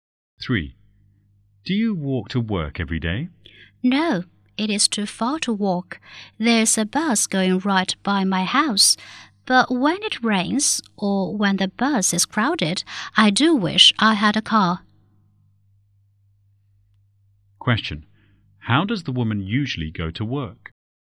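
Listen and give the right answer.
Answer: By bus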